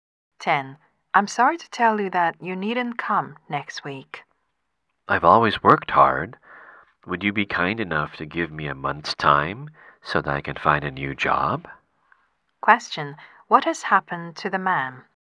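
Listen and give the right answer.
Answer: He has been fired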